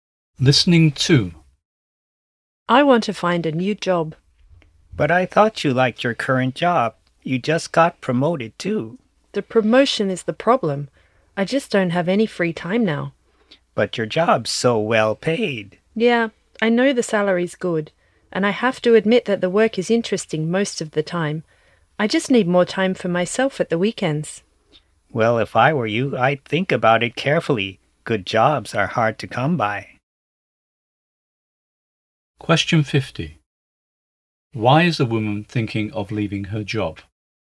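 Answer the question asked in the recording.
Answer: Since her promotion, she has no free time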